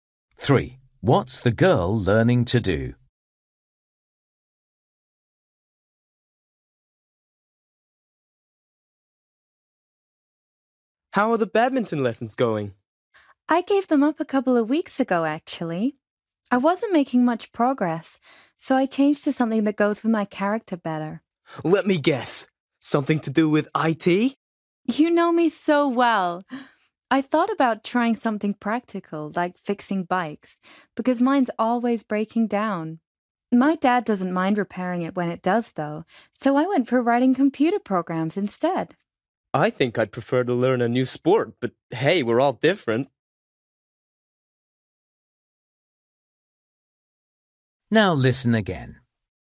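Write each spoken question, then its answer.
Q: What's the girl learning to do?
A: Writing computer programs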